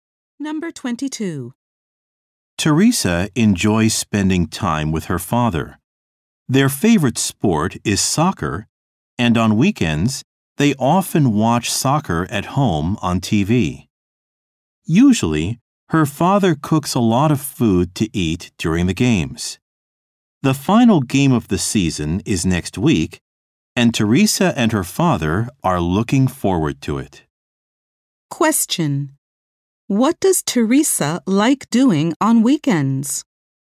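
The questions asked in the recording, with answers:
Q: What does Teresa like doing on weekends?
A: Watching soccer on TV with her father.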